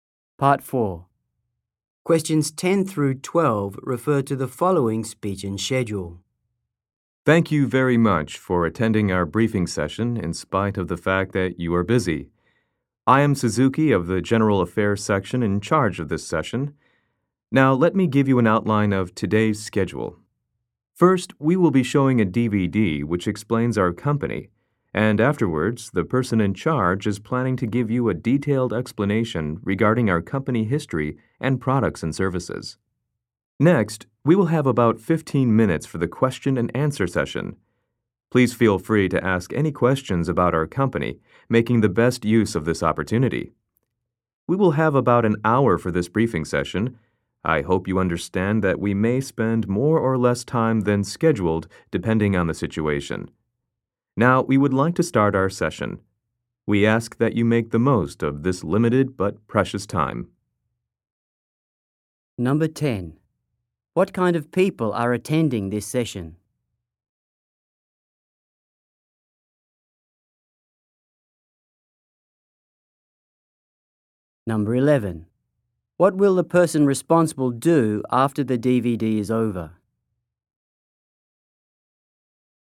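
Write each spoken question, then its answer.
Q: What will the person responsible do after the DVD is over?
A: Explain the company's history, products and services in detail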